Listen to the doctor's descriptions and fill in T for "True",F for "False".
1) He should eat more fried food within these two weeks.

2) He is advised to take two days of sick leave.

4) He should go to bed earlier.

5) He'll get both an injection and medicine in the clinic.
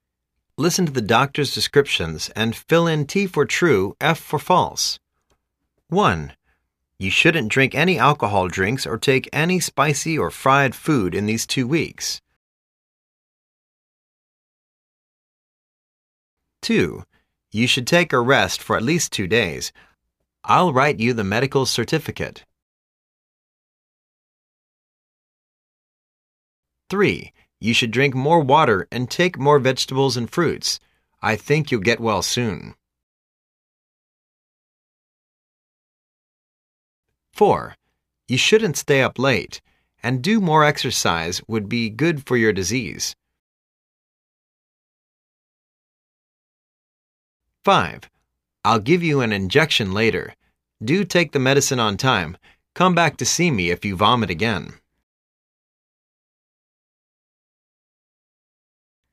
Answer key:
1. False
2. True
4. True
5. True

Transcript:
1.You shouldn't drink any alcohol drinks or take any spicy or fried food in these two weeks.
2.You should take a rest for at least two days. l'II write you the medical certificate.
3.You should drink more water and take more vegetables and fruits. I think you'II get well soon.
4.You shouldn't stay up late. And, do more exercise would be good for your disease.
5.I'II give you an injection later. Do take the medicine on time. Come back to see me if you vomit again.